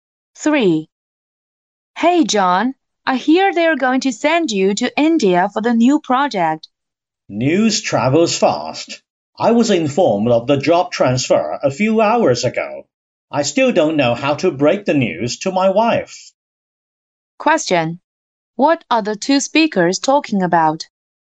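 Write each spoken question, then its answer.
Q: What are the two speakers talking about?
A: John's job transfer to India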